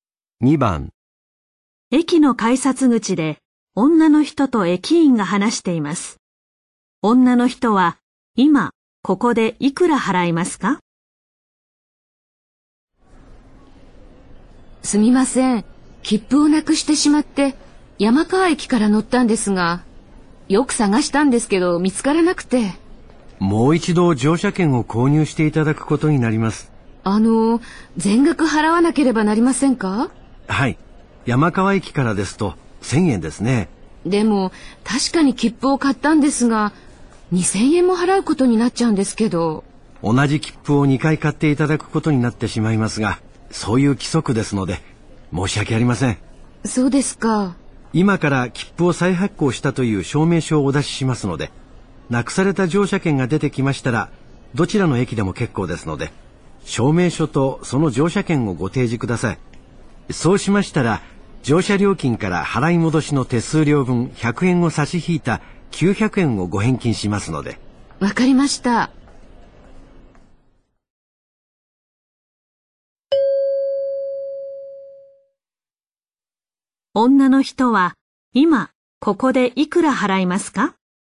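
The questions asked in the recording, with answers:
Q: 女の人は今ここでいくら払いますか?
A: 1000円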